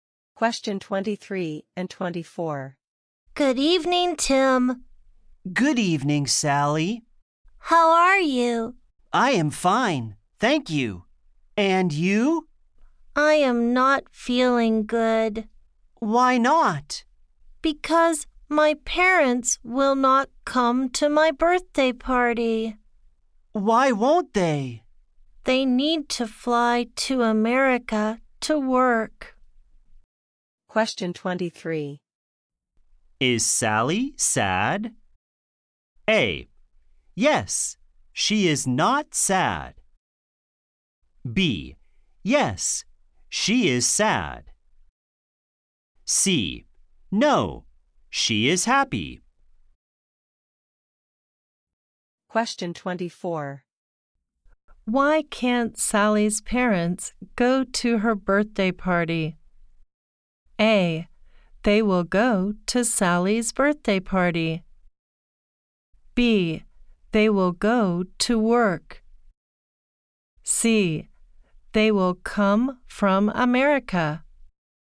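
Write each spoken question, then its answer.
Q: Is Sally sad?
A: B: Yes, she is sad.

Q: Why can't Sally's parents go to her birthday party?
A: B: They will go to work.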